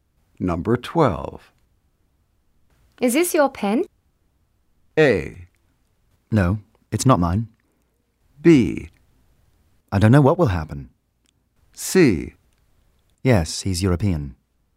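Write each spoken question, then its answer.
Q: Is this your pen?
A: A: No, it's not mine.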